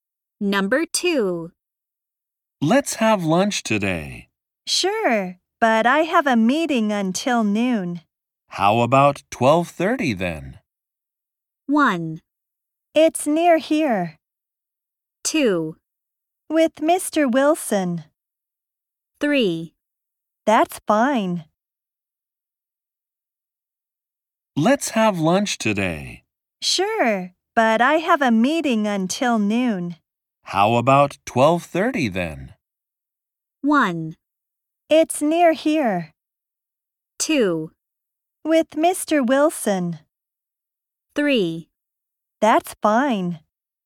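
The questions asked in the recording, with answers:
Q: How about 12:30 then?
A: 3: That's fine.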